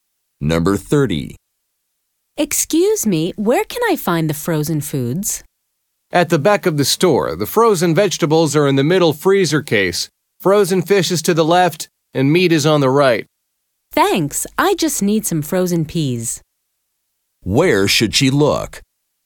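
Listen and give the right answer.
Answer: In the middle freezer case at the back of the store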